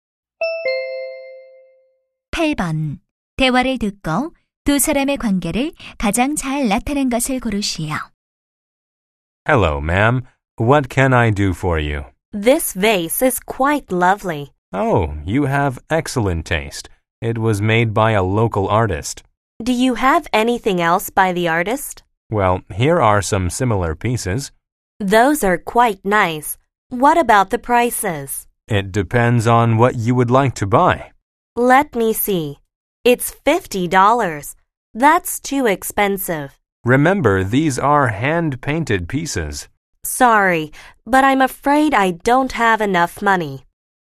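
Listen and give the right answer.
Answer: 점원과 손님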